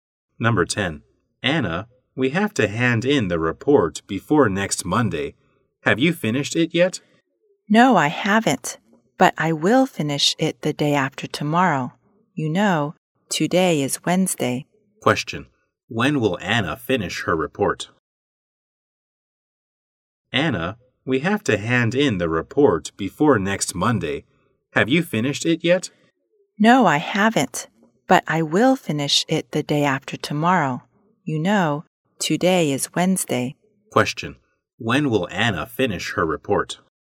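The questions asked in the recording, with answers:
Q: When will Anna finish her report?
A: On Friday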